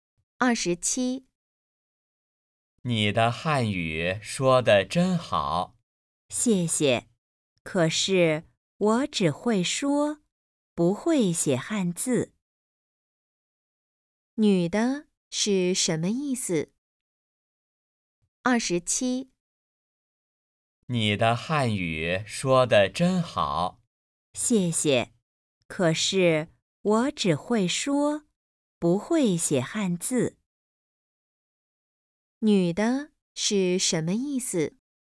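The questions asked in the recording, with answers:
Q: 女的是什么意思?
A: 她只会说汉语,不会写汉字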